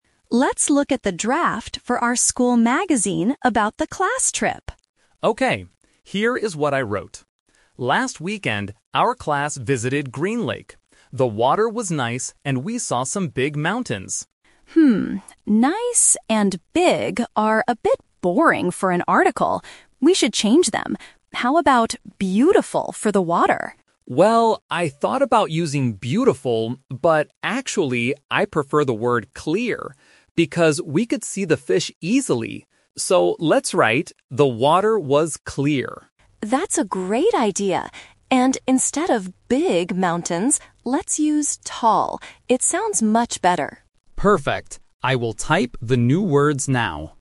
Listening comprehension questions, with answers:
Listen to a conversation between two students in the school press club. Choose the correct answer (A, B, or C) for each question.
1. What did the boy write about the water in his first draft?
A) It was clear.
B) It was beautiful.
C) It was nice.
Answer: C) It was nice.

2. What word do they finally choose to describe the water?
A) Beautiful.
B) Clear.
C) Nice.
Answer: B) Clear.

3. What word will they use to describe the mountains?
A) Tall.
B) Big.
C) Green.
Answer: A) Tall.

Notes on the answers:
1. The boy reads his first draft, saying: "The water was nice..." Option A and B are the words they discuss using later, but "nice" is the word in the original draft.
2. The boy says, "but actually, I prefer the word 'clear'... So let's write, 'The water was clear'." Option A is the trap: the girl suggests "beautiful", but they decide not to use it. Option C is the trap: "nice" is the boring word they want to change.
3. The girl suggests, "instead of 'big' mountains, let's use 'tall'." and the boy agrees. Option B is the trap: "big" is the word in the old draft that they are replacing. Option C is a trap: "Green" is the name of the lake, not the description of the mountains.

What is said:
Girl: Let's look at the draft for our school magazine about the class trip.
Boy: Okay. Here is what I wrote: "Last weekend, our class visited Green Lake. The water was nice, and we saw some big mountains."
Girl: Hmm, "nice" and "big" are a bit boring for an article. We should change them. How about "beautiful" for the water?
Boy: Well, I thought about using "beautiful", but actually, I prefer the word "clear". Because we could see the fish easily! So let's write, "The water was clear".
Girl: That's a great idea! And instead of "big" mountains, let's use "tall".

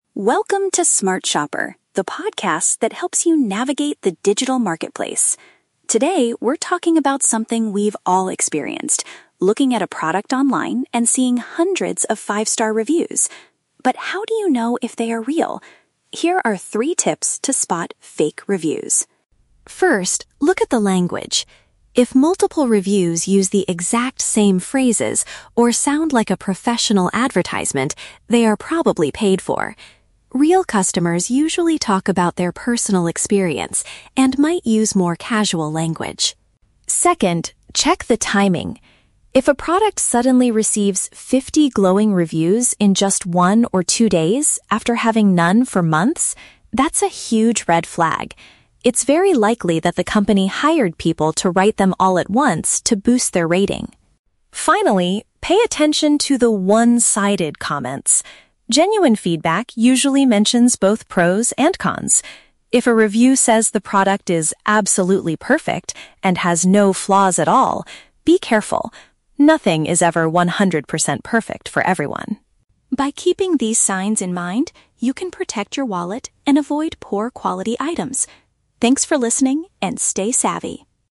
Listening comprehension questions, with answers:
Listen to a podcast about online reviews and choose the best answer (A, B, or C) for each question.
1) What is the first sign of a fake review mentioned by the host?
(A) The reviewer uses a lot of technical words that are hard to understand.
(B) The feedback sounds too much like a prepared marketing message.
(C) The person writing the review provides too many personal photos.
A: (B) The feedback sounds too much like a prepared marketing message.

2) Why should shoppers be suspicious if a product gets many reviews in a short time?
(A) It means the item has become too popular and will soon be out of stock.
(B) It suggests the company may have paid individuals to write them.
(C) It shows that the shipping service has suddenly become much faster.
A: (B) It suggests the company may have paid individuals to write them.

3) According to the host, what does a "genuine" review typically look like?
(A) It focuses only on the positive features to help the seller.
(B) It lists both the good and the bad points of the product.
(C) It is written by someone who has a "verified buyer" badge.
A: (B) It lists both the good and the bad points of the product.

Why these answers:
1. The host mentions that fake reviews "sound like a professional advertisement." Option B paraphrases this as a "prepared marketing message." Why the trap is wrong: Option (A) is a trap. The host says real customers use "casual language," but doesn't say fake ones use "technical words." Option (C) is not mentioned.
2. The host states it's a "red flag" if reviews appear all at once because the company might have "hired people to write them." Option B uses synonyms: "paid individuals" instead of "hired people." Why the trap is wrong: Option (A) is a plausible real-world situation but is not mentioned as a reason for suspicion in the audio. Option (C) is also not mentioned.
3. The host says genuine feedback "usually mentions both pros and cons." Option B paraphrases this as "both the good and the bad points." Why the trap is wrong: Option (A) is a trap (describes a fake review). The host warns against reviews that say a product is "absolutely perfect." Option (C) is a common feature on shopping sites but is not discussed in this podcast.

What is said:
Host: Welcome to Smart Shopper, the podcast that helps you navigate the digital marketplace. Today, we're talking about something we've all experienced: looking at a product online and seeing hundreds of five-star reviews. But how do you know if they are real? Here are three tips to spot "fake reviews."
First, look at the language. If multiple reviews use the exact same phrases or sound like a professional advertisement, they are probably paid for. Real customers usually talk about their personal experience and might use more casual language.
Second, check the timing. If a product suddenly receives fifty glowing reviews in just one or two days after having none for months, that's a huge red flag. It's very likely that the company hired people to write them all at once to boost their rating.
Finally, pay attention to the "one-sided" comments. Genuine feedback usually mentions both pros and cons. If a review says the product is "absolutely perfect" and "has no flaws at all," be careful. Nothing is ever 100% perfect for everyone.
By keeping these signs in mind, you can protect your wallet and avoid poor-quality items. Thanks for listening, and stay savvy!

